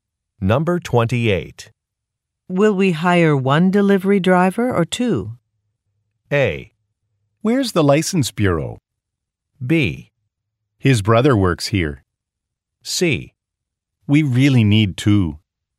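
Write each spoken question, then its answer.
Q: Will we hire one delivery driver or two?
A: C: We really need two.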